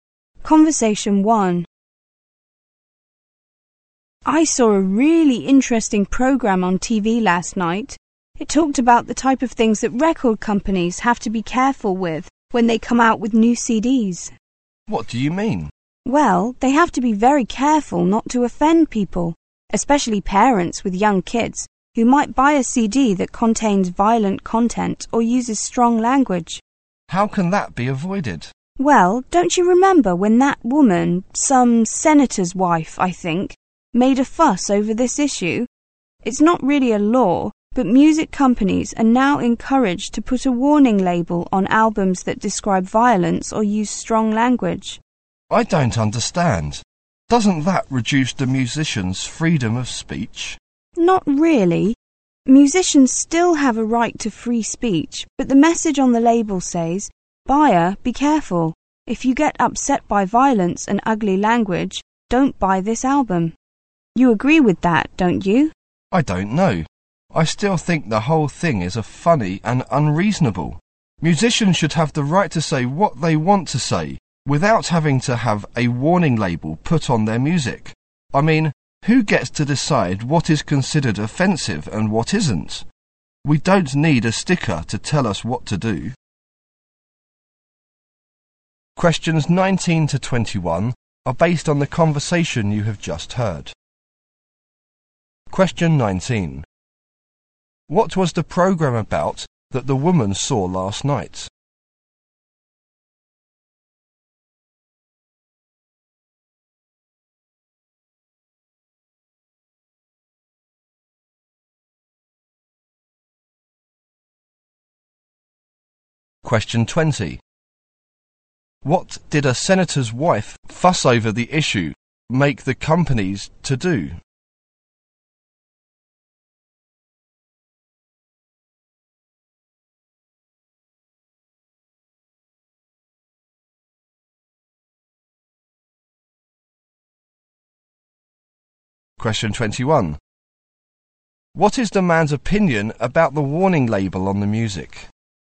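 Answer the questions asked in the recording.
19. What record companies must be careful with when releasing new CDs
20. Put warning labels on albums with violence or strong language
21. It is funny and unreasonable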